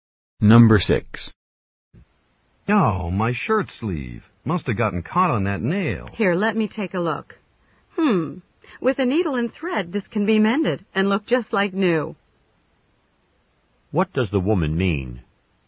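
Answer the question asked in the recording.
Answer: The shirt sleeve can be mended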